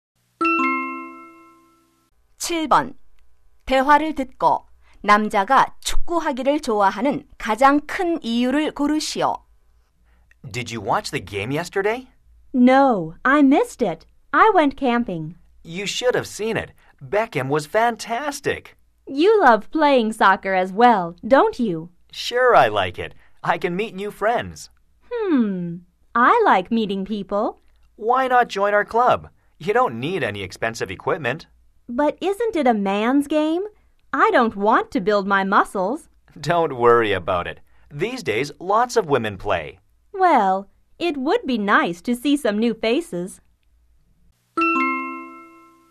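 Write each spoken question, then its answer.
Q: 대화를 듣고 남자가 축구하기를 좋아하는 가장 큰 이유를 고르시오.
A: 새 친구를 사귈 수 있어서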